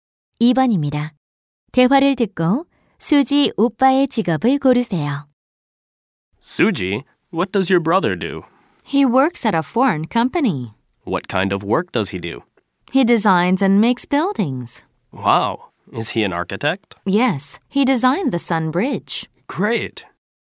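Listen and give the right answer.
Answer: 건축가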